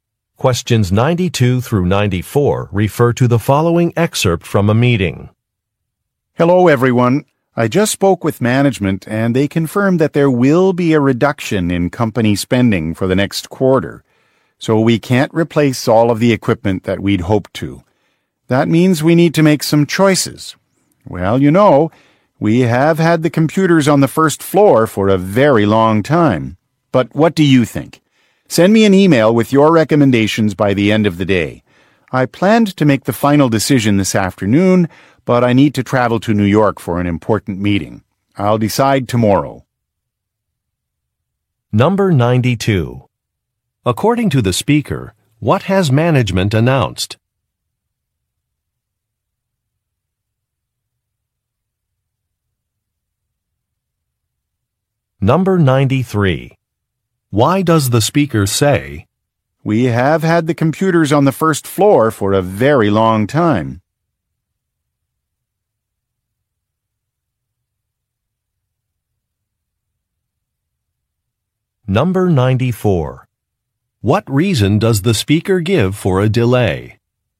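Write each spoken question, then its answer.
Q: According to the speaker, what has management announced?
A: A reduction in company spending next quarter

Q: What reason does the speaker give for a delay?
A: The speaker must travel to New York for an important meeting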